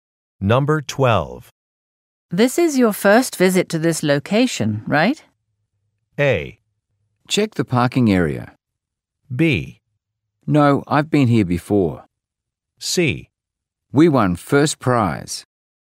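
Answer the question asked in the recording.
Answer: B: No, I've been here before.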